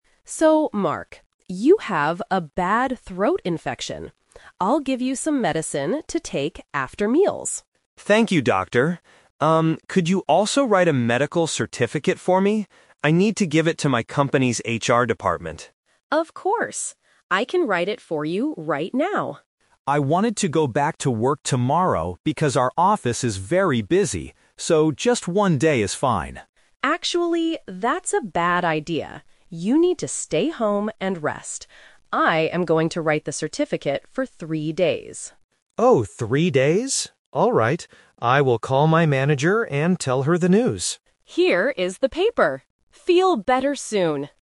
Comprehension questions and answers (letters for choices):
Listen to the conversation between a patient and a doctor. Choose the correct answer (A, B, or C) for each question.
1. Why does Mark need a medical certificate?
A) To buy some medicine at the pharmacy.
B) To give it to his company's HR department.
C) To show it to his manager tomorrow.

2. How many days off work did Mark want at first?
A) Only one day.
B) Two days.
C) Three days.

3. What is Mark going to do next?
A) Go back to work immediately.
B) Call his manager on the phone.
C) Visit the HR department today.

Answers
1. B
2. A
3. B

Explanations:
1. Mark clearly says, "I need to give it to my company's HR department." Trap A is wrong: The doctor gives him medicine, but the medical certificate is not for buying medicine. Trap C is wrong: Mark will call his manager to tell her the news, but he doesn't need the certificate to show her tomorrow (and he is not going to work tomorrow anyway).
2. Mark says he wanted to go back to work tomorrow, so he tells the doctor, "just one day is fine." Trap C is wrong (The Twist): Three days is the number of days the doctor actually gives him, not what Mark wanted at first. Trap B is wrong: Two days is never mentioned in the audio.
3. After the doctor tells him to rest for three days, Mark says, "I will call my manager and tell her the news." Trap A is wrong: Mark wanted to go to work tomorrow, but the doctor said "that's a bad idea," so he will stay home. Trap C is wrong: He needs to give the certificate to HR, but he will do that when he returns to work, not today while he is sick.

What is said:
Doctor: So, Mark, you have a bad throat infection. I'll give you some medicine to take after meals.
Mark: Thank you, Doctor. Um, could you also write a medical certificate for me? I need to give it to my company's HR department.
Doctor: Of course. I can write it for you right now.
Mark: I wanted to go back to work tomorrow because our office is very busy. So, just one day is fine.
Doctor: Actually, that's a bad idea. You need to stay home and rest. I am going to write the certificate for three days.
Mark: Oh, three days? Alright. I will call my manager and tell her the news.